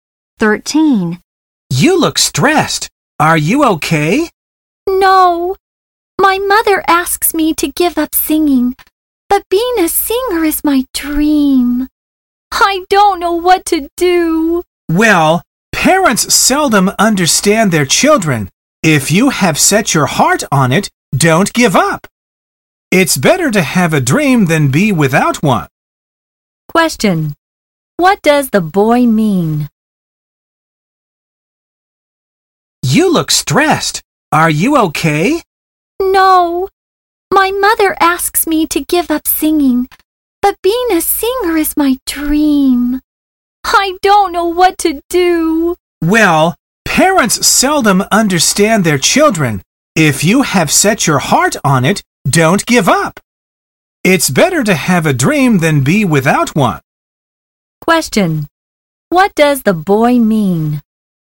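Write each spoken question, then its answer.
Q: What does the boy mean?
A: The girl shouldn't give up her dream of being a singer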